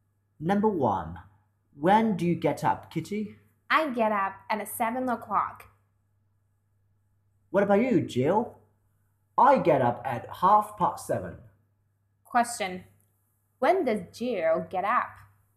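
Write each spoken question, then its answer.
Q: Question. When does Jill get up?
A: At 7:30.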